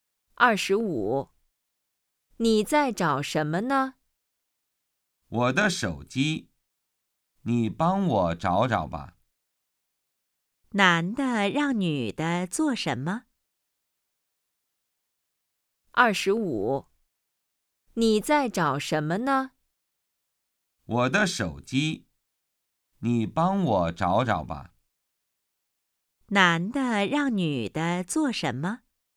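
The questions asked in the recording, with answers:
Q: 男的让女的做什么?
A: 帮他找手机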